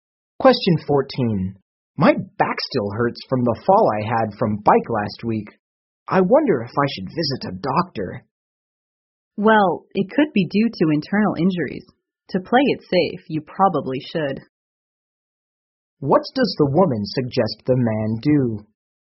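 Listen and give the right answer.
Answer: See a doctor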